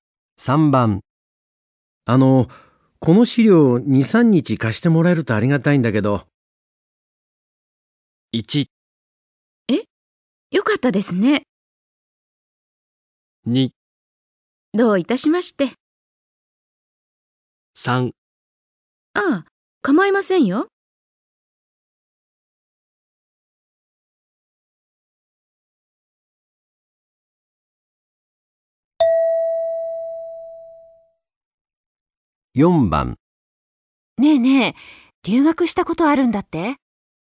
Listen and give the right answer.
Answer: 3

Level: N2 Listening · Test 3